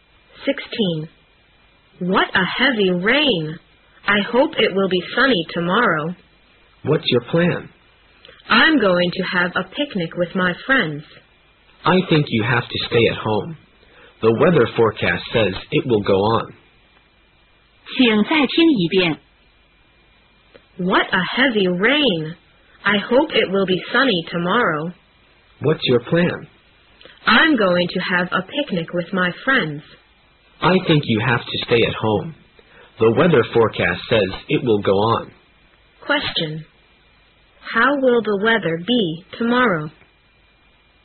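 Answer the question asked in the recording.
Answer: Rainy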